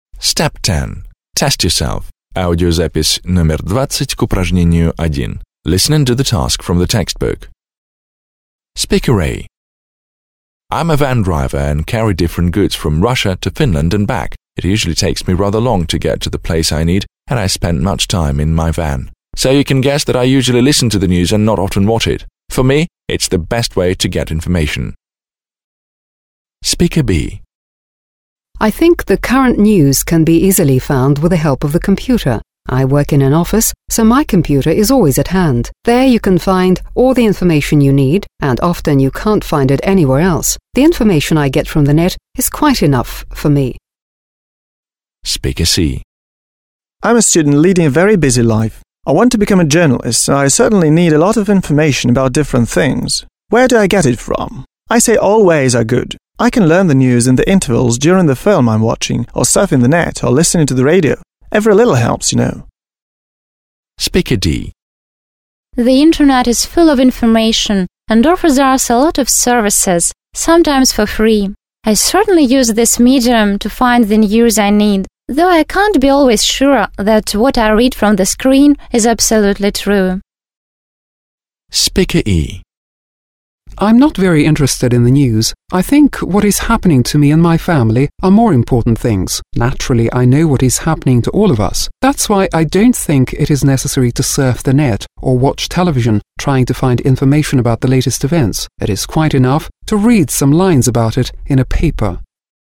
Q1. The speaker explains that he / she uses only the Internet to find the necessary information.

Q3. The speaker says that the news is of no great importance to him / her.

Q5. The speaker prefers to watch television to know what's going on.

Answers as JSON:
{"1": "В", "3": "Е", "5": "extra"}

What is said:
I'm a van driver and carry different goods from Russia to Finland and back. It usually takes me a rather long time to get to the place I need and I spend a lot of time in my van. So, you can guess that I usually listen to the news and don't not often watch it. For me, it's the best way to get information.
I think current news can be easily found with the help of the computer. I work in an office, so, my computer is always at hand. There you can find all the information you need and often you can't find it anywhere else. The information I get from the Net is quite enough for me.
I'm a student leading a very busy life. I want to become a journalist, and I certainly need a lot of information about different things. Where do I get it from? I say all ways are good. I can find out the news during the breaks of the film I'm watching, or surfing the Net, or listening to the radio. Every little helps, you know.
Speaker D. – Спикер D.
The Internet is full of information and offers a lot of services, sometimes for free. I certainly use this media to find the news I need, though I can't be always sure that what I read from the screen is absolutely true.
Speaker E. – Спикер E
I'm not very interested in the news. I think what is happening to me and my family are more important. Naturally I know what is happening to all of us. That's why I don't think it is necessary to surf the Net or watch television trying to find information about the latest events. It is quite enough to read some lines about it in a paper.

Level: 9 класс